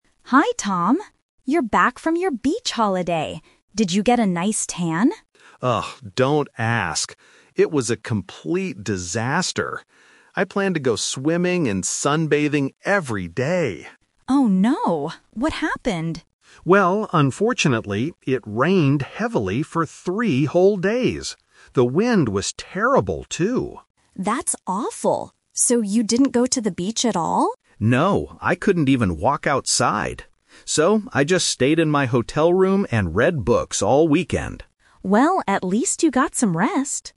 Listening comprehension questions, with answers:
Listen to a conversation between two colleagues about a holiday. Choose the correct answer (A, B, or C) for each question.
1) What did Tom plan to do on his holiday?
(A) Go swimming and sunbathing.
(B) Read books in his room.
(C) Visit a museum.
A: Go swimming and sunbathing.

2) Why didn't Tom go to the beach?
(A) The beach was too crowded.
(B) It rained heavily for three days.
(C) He was too tired to walk outside.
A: It rained heavily for three days.

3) What did Tom actually do during the weekend?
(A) He walked outside in the rain.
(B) He went swimming.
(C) He stayed in his hotel room.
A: He stayed in his hotel room.

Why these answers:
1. Tom says, "I planned to go swimming and sunbathing every day." Option B is the trap: reading books is what he actually did, not what he planned to do. Option C is a plausible rainy day activity but is not mentioned in the audio.
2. Tom explicitly states, "...unfortunately, it rained heavily for three whole days!" Option A is not mentioned. Option C is a trap: he says "I couldn't even walk outside" because of the bad weather, not because he was tired.
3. Tom says, "So, I just stayed in my hotel room and read books all weekend." Option A is the trap: he explicitly says he "couldn't even walk outside." Option B is the trap: he planned to go swimming, but he didn't do it.

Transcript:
Woman: Hi Tom. You're back from your beach holiday! Did you get a nice tan?
Man: Oh, don't ask. It was a complete disaster. I planned to go swimming and sunbathing every day.
Woman: Oh no. What happened?
Man: Well, unfortunately, it rained heavily for three whole days! The wind was terrible, too.
Woman: That's awful! So you didn't go to the beach at all?
Man: No. I couldn't even walk outside. So, I just stayed in my hotel room and read books all weekend.

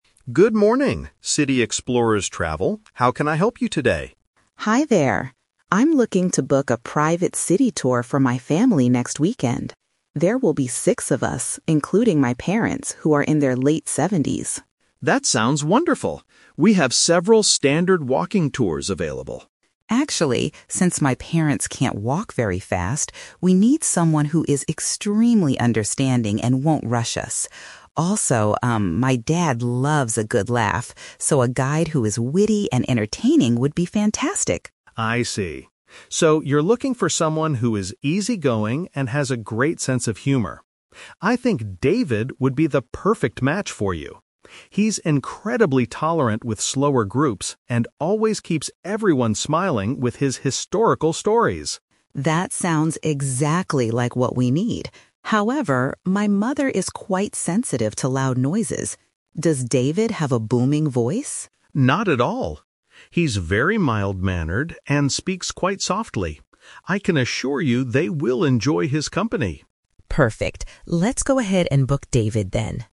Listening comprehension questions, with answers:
Listen to a conversation between a travel agent and a tourist. For each question, choose the correct answer A, B, or (C).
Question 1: Why does Mrs. Higgins need a specific type of tour guide?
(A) She thinks standard walking tours are too expensive.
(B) She is traveling with elderly family members.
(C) She wants a guide who knows a lot of local history.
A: She is traveling with elderly family members.

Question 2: What personality traits does Mrs. Higgins want the guide to have?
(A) Patient and amusing.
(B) Serious and highly organized.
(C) Energetic and very loud.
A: Patient and amusing.

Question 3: Why does Mrs. Higgins ask about the guide's voice?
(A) Her father cannot hear very well nowadays.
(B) Her mother easily gets a headache from the sun.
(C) Her mother feels uncomfortable with loud sounds.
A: Her mother feels uncomfortable with loud sounds.

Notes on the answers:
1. Mrs. Higgins mentions that her group includes her "parents who are in their late seventies" and they "can't walk very fast." The phrase "elderly family members" is a paraphrase for parents in their late seventies.
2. Mrs. Higgins wants someone who is "understanding and won't rush us" (which means patient) and "witty and entertaining" (which means amusing).
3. Mrs. Higgins states that her mother is "quite sensitive to loud noises." Feeling uncomfortable with loud sounds is a direct paraphrase of this condition.

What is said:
Mr. Clark: Good morning, City Explorers Travel. How can I help you today?
Higgins: Hi there. I'm looking to book a private city tour for my family next weekend. There will be six of us, including my parents who are in their late seventies.
Clark: That sounds wonderful. We have several standard walking tours available.
Higgins: Actually, since my parents can't walk very fast, we need someone who is extremely understanding and won't rush us. Also, um, my dad loves a good laugh, so a guide who is witty and entertaining would be fantastic.
Clark: I see. So you're looking for someone who is easygoing and has a great sense of humor. I think David would be the perfect match for you. He's incredibly tolerant with slower groups and always keeps everyone smiling with his historical stories.
Higgins: That sounds exactly like what we need. However, my mother is quite sensitive to loud noises. Does David have a booming voice?
Clark: Not at all. He's very mild-mannered and speaks quite softly. I can assure you they will enjoy his company.

